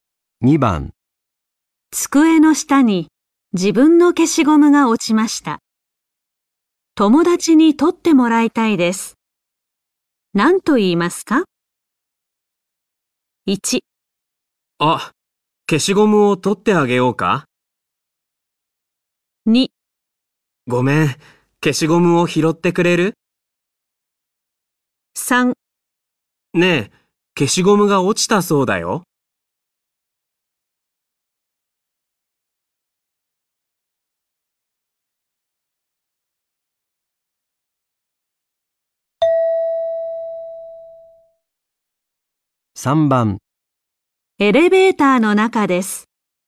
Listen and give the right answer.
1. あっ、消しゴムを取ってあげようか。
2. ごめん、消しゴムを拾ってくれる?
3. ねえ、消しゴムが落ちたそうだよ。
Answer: 2. ごめん、消しゴムを拾ってくれる?

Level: N4 Listening · Test 1